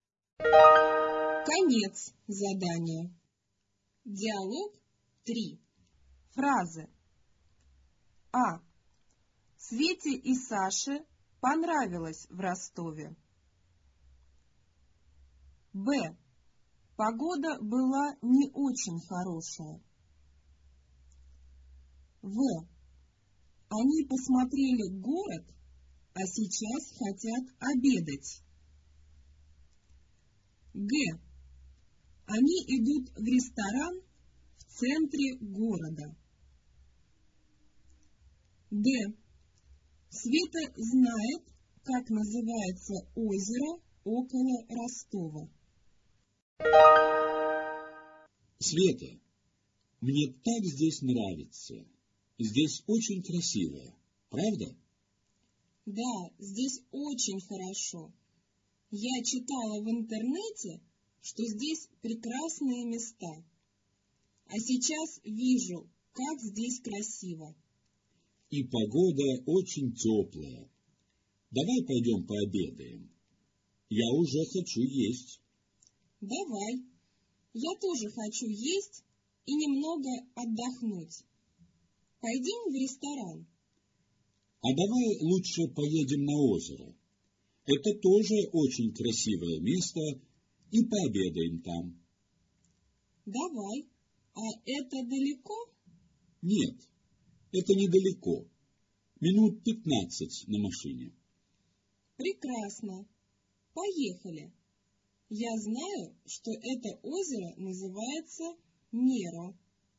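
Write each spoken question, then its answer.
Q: Свете и Саше понравилось в Ростове.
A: плюс (верно)

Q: Погода была не очень хорошая.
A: минус (неверно)

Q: Они идут в ресторан в центре города.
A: минус (неверно)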